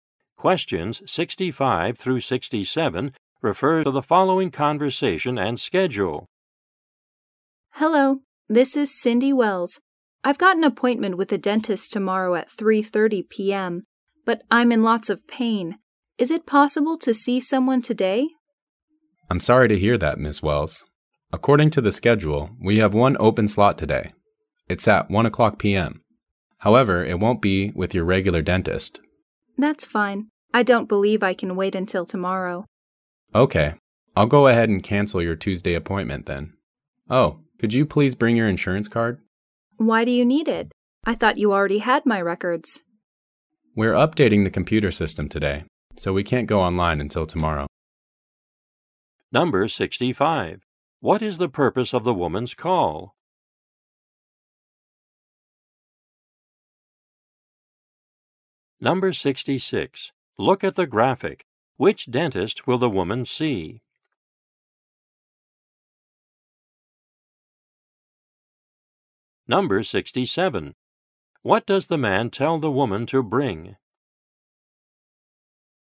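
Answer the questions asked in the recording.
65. To see a dentist today instead of tomorrow
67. Her insurance card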